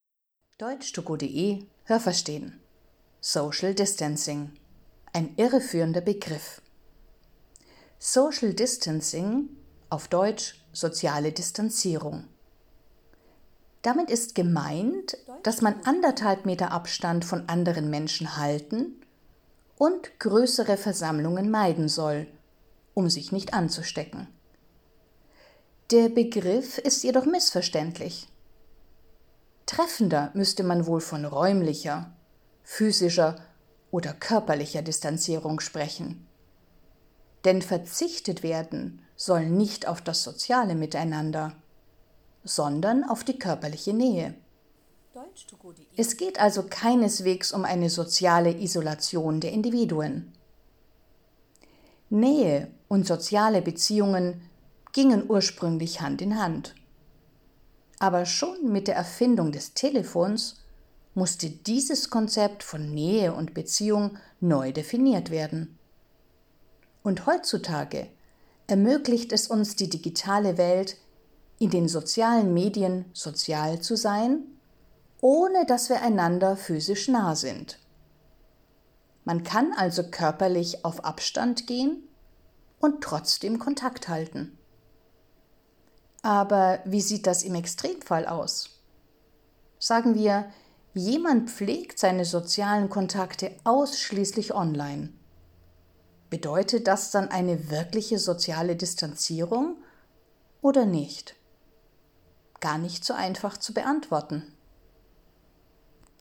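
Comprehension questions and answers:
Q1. „Social Distancing" bedeutet, dass man sich räumlich von anderen Menschen entfernt, um sich nicht zu infizieren.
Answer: richtig

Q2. Der Begriff „Social Distancing" ist eindeutig.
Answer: falsch

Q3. Bei der sozialen Distanzierung soll auf das soziale Miteinander verzichtet werden.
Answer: falsch

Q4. Man sollte den Begriff „Social Distancing" eigentlich besser mit physischer oder körperlicher Distanzierung übersetzen.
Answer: richtig

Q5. Soziale Beziehungen waren früher nur mit Nähe möglich und daran hat sich bis heute nichts geändert.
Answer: falsch

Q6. Mit digitalen Medien kann man auch ohne körperliche Nähe soziale Kontakte aufrechterhalten.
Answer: richtig

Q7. Eines steht fest: Wenn sich das soziale Miteinander ausschließlich online abspielt, dann führt das automatisch zur sozialen Isolation.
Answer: falsch

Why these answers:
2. Der Begriff ist nicht klar, sondern missverständlich.
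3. Man soll auf körperliche Nähe verzichten.
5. Schon mit der Erfindung des Telefons konnte man auch aus der Distanz soziale Kontakte pflegen.
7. Diese Frage kann man nicht so einfach beantworten.

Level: B (mittel)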